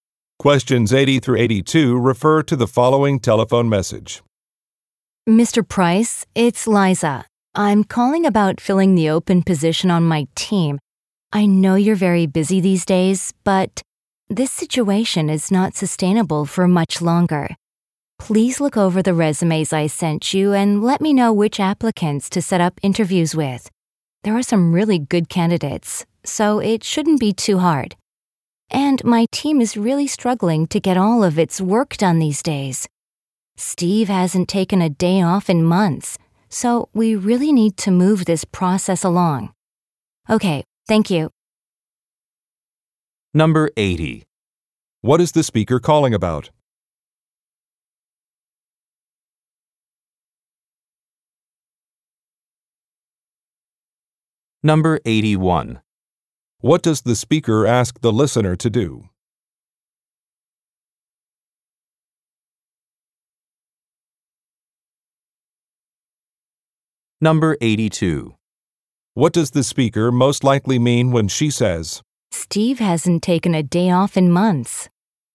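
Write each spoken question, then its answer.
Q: What is the speaker calling about?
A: Filling an open position on her team

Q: What does the speaker ask the listener to do?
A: Review the resumes and choose applicants to interview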